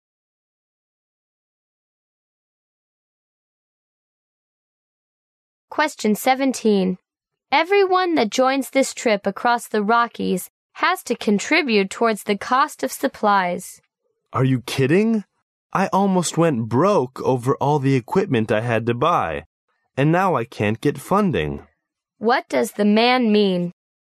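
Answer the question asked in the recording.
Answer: He can't afford to pay toward the supplies.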